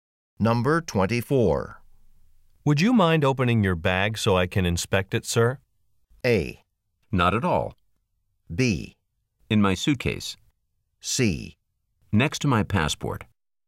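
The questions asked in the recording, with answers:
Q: Would you mind opening your bag so I can inspect it, sir?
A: A: Not at all.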